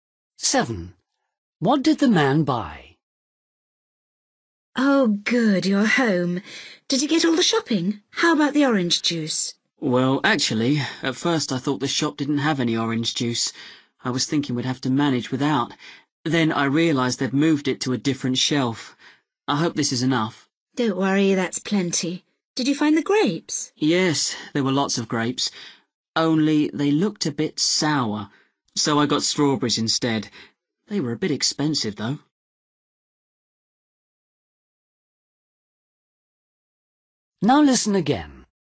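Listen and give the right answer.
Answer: orange juice and strawberries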